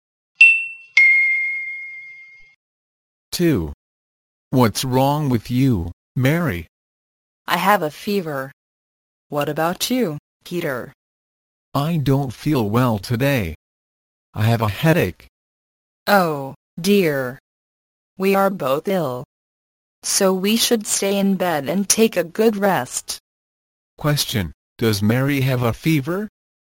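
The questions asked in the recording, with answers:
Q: Question, does Mary have a fever?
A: Yes, she does.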